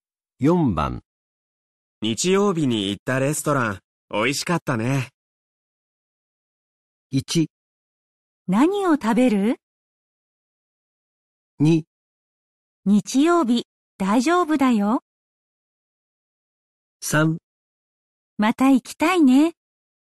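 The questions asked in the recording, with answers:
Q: 日曜日に行ったレストラン、美味しかったね。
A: 3: また行きたいね。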